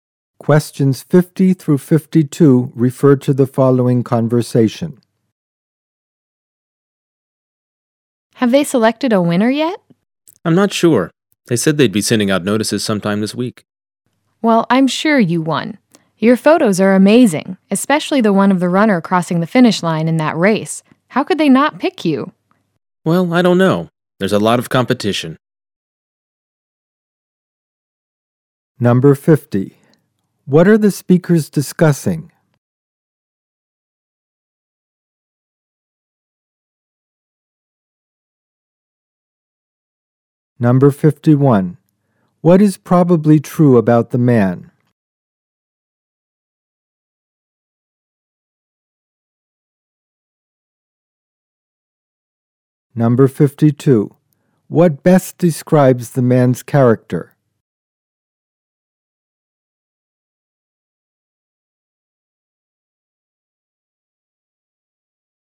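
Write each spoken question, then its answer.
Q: What are the speakers discussing?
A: The results of a photography contest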